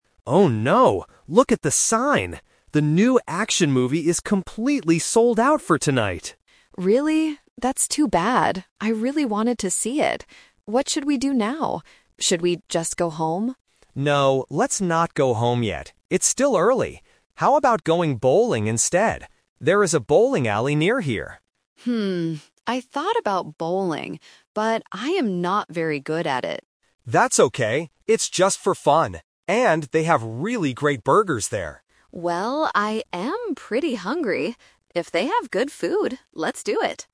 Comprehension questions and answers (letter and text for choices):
Listen to the conversation and choose the correct answer (A, B, or C).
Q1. Why can't they watch the movie?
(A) The movie theater is closed.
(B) There are no tickets left.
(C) They do not like action movies.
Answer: (B) There are no tickets left.

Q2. What does Lily suggest doing when she hears the bad news?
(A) Going home.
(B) Going bowling.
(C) Going to a restaurant.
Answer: (A) Going home.

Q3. Why does Lily finally agree to go to the bowling alley?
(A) Because she is very good at bowling.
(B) Because it is close to her house.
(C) Because she wants to eat the food there.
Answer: (C) Because she wants to eat the food there.

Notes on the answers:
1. Dan says the movie is "completely sold out" (which means there are no tickets left). Option C is the Trap because Lily specifically says, "I really wanted to see it." Option A is a plausible reason but is not mentioned in the audio.
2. When Lily finds out the movie is sold out, she asks, "Should we just go home?" Option B is the Trap because Dan is the one who suggests going bowling, not Lily. Option C is not mentioned.
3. This is the Final Result. Dan mentions they have "great burgers" at the bowling alley, and Lily agrees because she is "pretty hungry" and wants "good food." Option A is the Trap; Lily explicitly states, "I am not very good at it." Option B is not mentioned.

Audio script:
Dan: Oh no, look at the sign. The new action movie is completely sold out for tonight!
Lily: Really? That's too bad. I really wanted to see it. What should we do now? Should we just go home?
Dan: No, let's not go home yet. It's still early. How about going bowling instead? There is a bowling alley near here.
Lily: Hmm... I thought about bowling, but I am not very good at it.
Dan: That's okay! It's just for fun. And they have really great burgers there.